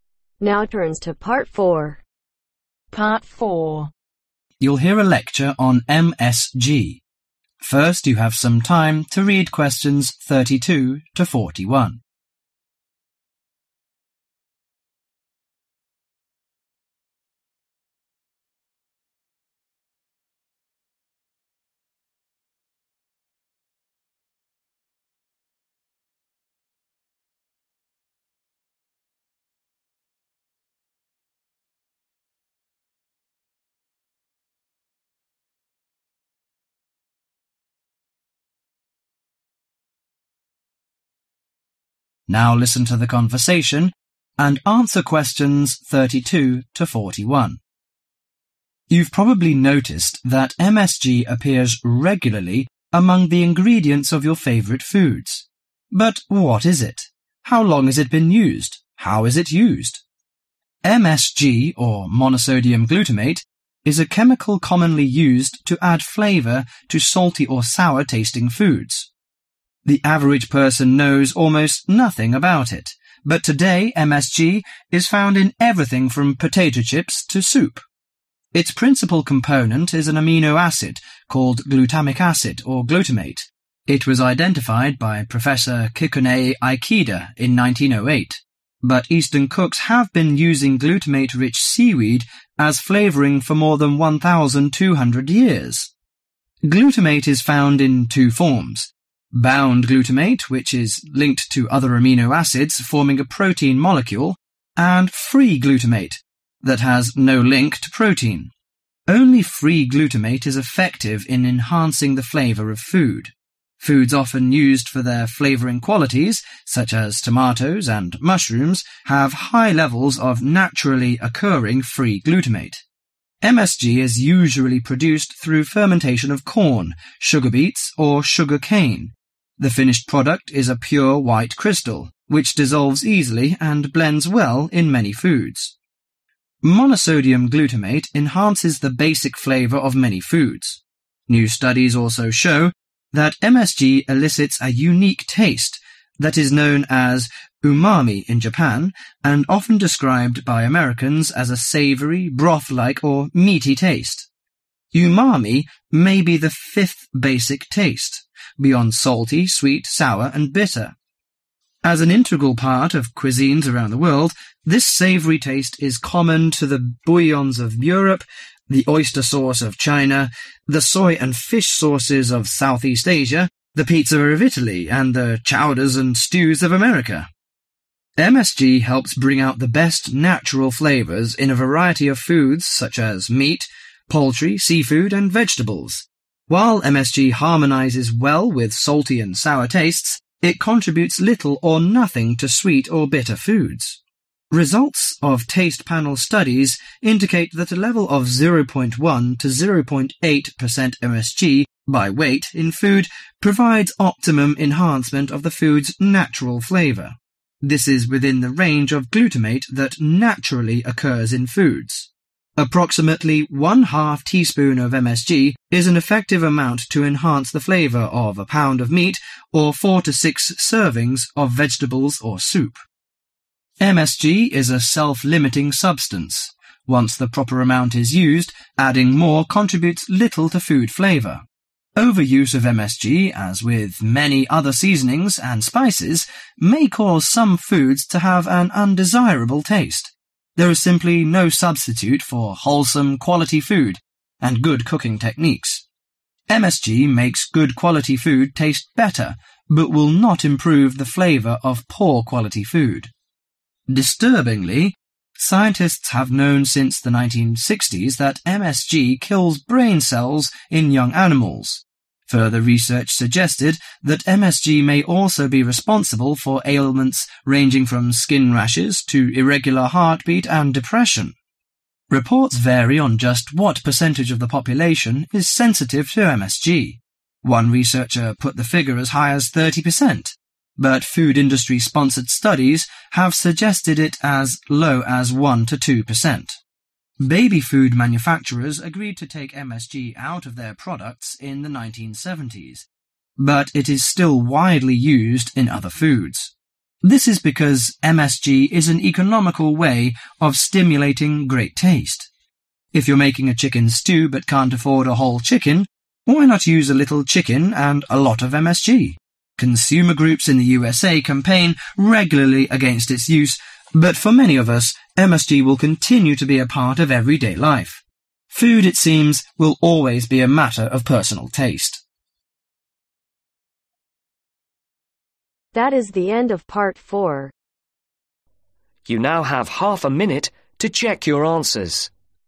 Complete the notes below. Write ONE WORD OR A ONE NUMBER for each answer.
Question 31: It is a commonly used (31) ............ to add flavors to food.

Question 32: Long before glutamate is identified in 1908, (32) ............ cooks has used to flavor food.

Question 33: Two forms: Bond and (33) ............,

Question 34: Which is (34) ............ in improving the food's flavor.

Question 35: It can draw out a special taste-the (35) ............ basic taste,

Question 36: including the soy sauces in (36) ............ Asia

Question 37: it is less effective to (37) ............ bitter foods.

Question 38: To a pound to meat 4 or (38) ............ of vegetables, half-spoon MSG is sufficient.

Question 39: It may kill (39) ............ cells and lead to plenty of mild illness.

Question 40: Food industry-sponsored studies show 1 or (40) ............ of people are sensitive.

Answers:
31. chemical
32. Eastern
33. Free
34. effective
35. 5th
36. Southeast
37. sweet
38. 6
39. brain
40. 2%